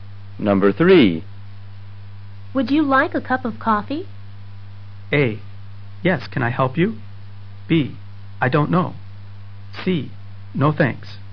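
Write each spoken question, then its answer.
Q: Would you like a cup of coffee?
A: C: No thanks.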